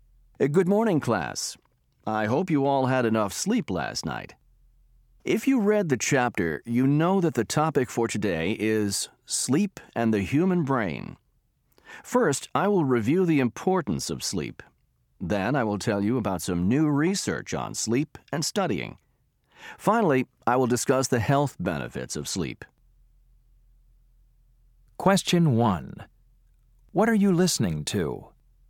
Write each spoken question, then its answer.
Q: What are you listening to?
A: This lecture will cover some of the information in your textbook and add some new information.